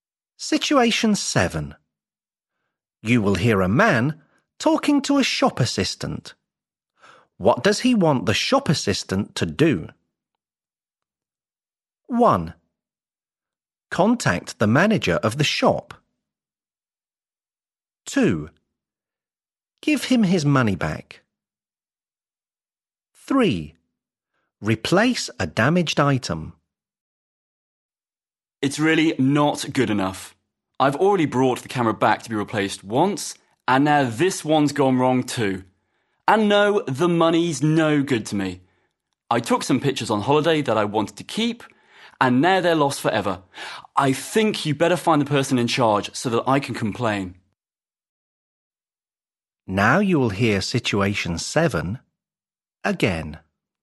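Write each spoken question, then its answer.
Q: What does he want the shop assistant to do?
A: 1: Contact the manager of the shop.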